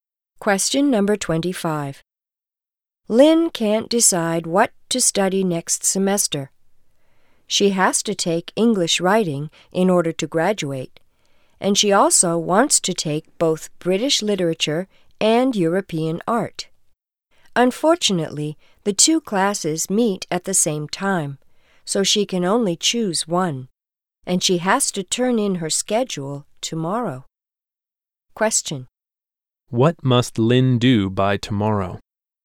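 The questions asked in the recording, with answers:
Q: What must Lynn do by tomorrow?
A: Turn in her schedule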